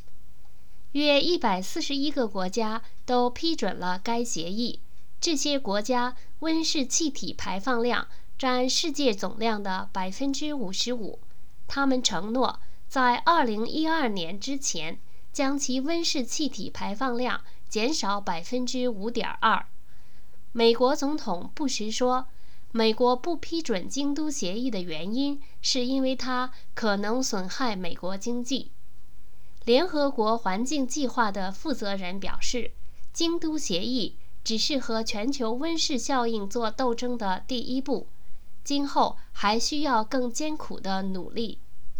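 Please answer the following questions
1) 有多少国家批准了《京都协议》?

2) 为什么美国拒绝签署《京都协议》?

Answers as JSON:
{"1": "约141个国家", "2": "因为它可能损害美国经济"}

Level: 3rd Year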